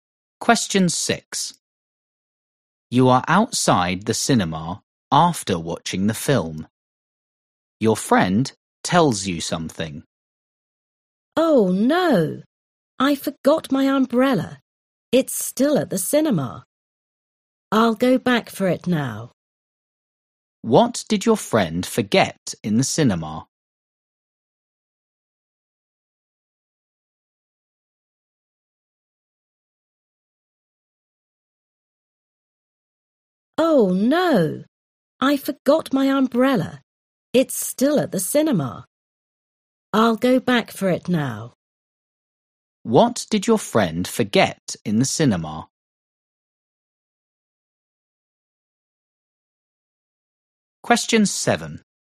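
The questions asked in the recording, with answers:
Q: What did your friend forget in the cinema?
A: An umbrella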